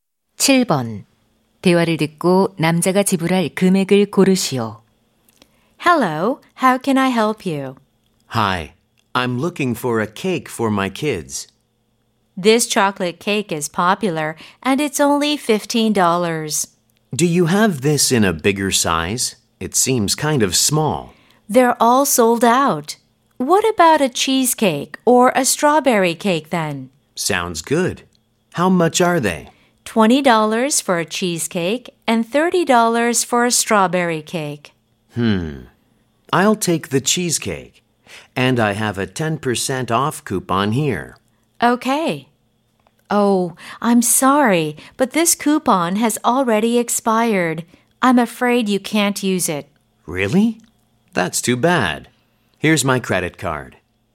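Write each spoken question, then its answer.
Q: 대화를 듣고 남자가 지불할 금액을 고르시오.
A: $20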